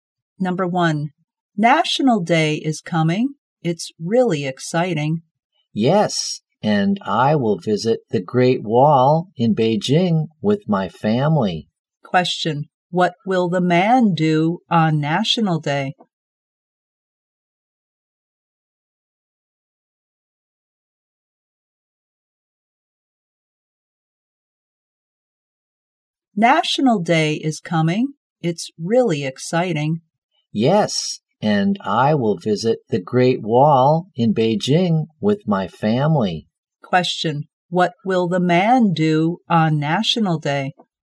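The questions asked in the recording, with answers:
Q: what will the man do on National Day?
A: Visit the Great Wall in Beijing with his family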